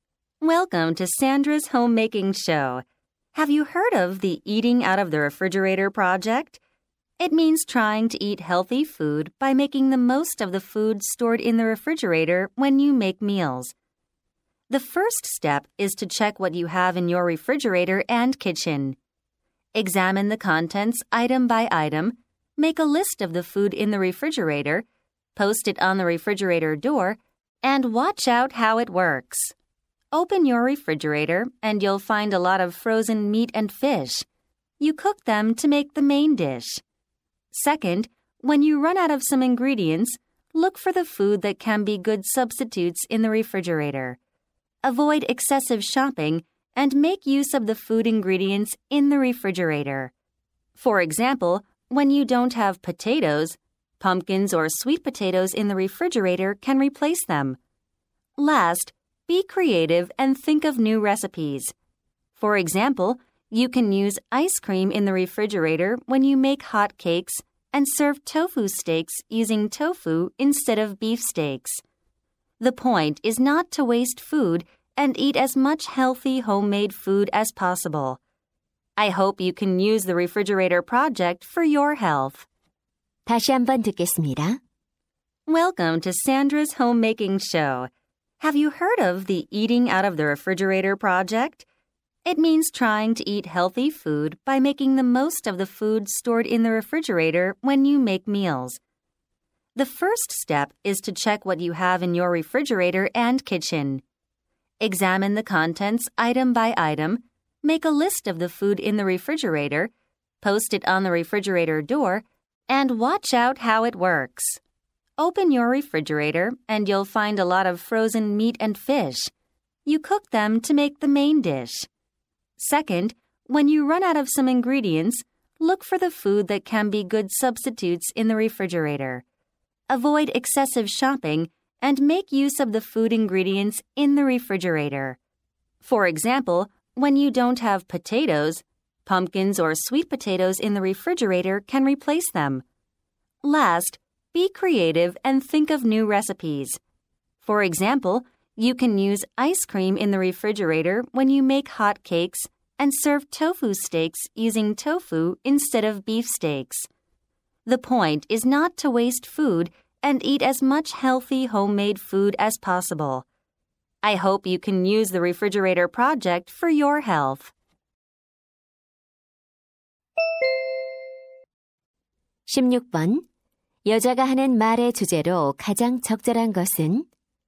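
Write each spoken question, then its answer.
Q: 여자가 하는 말의 주제로 가장 적절한 것은?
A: 냉장고 속 음식을 활용해 건강하게 먹는 방법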